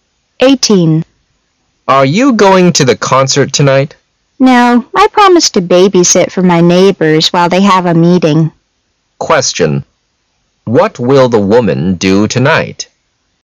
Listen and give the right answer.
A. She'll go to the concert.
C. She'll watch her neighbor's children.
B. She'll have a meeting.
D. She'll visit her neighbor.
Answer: C. She'll watch her neighbor's children.

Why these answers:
M: Are you going to the concert tonight? W: No, I promised to baby-sit for my neighbors while they have a meeting. Q: What will the woman do tonight?